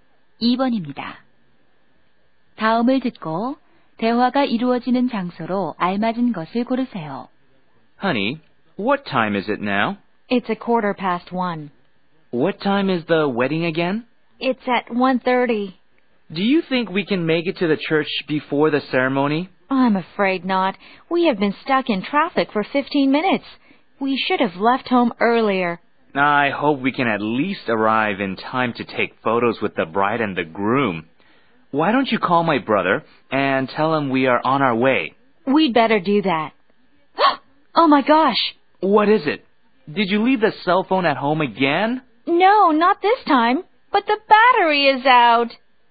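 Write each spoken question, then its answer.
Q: 다음을 듣고 대화가 이루어지는 장소로 알맞은 것을 고르세요.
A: 차 안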